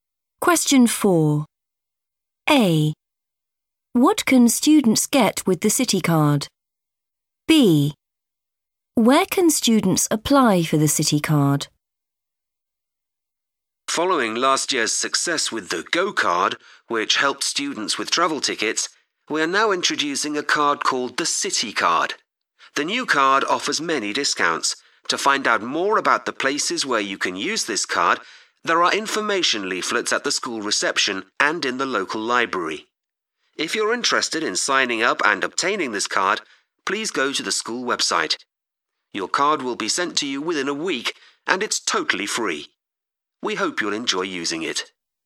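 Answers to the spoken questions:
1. discounts
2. on the school website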